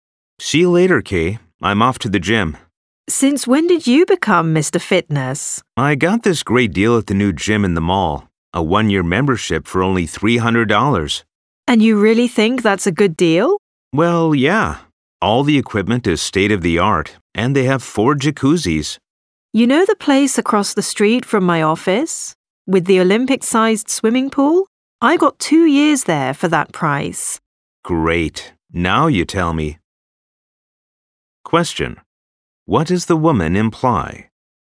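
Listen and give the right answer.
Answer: The man did not get a good deal; she got two years at another gym for the same price.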